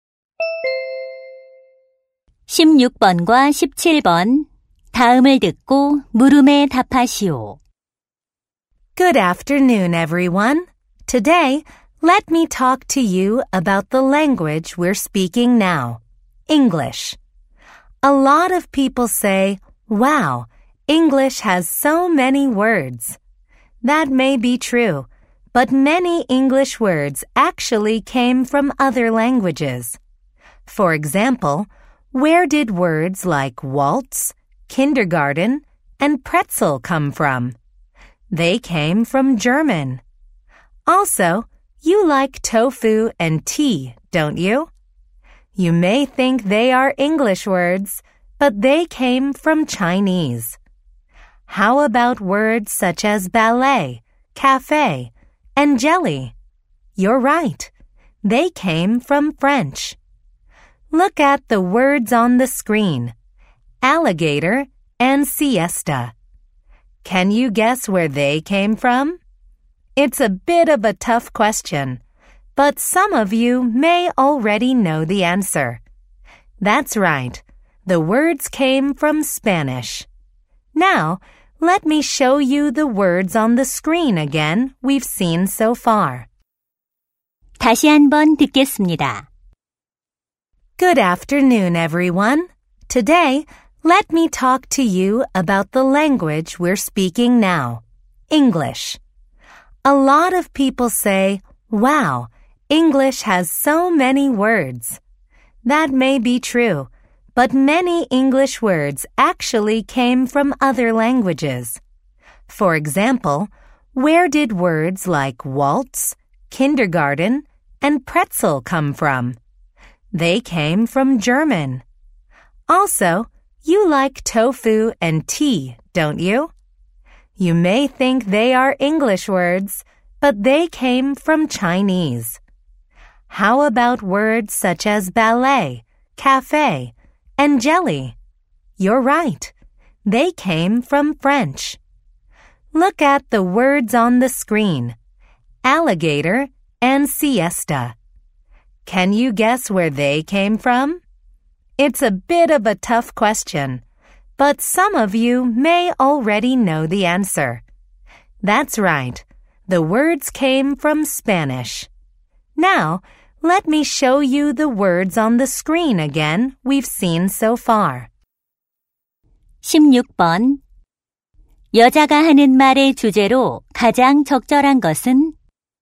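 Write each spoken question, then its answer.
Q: 여자가 하는 말의 주제로 가장 적절한 것은?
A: 다른 언어에서 유래한 영어 단어들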